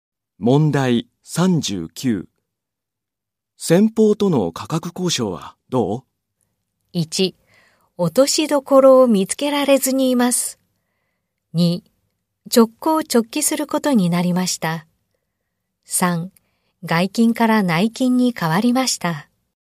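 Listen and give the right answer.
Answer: 1: 落としどころを見つけられずにいます。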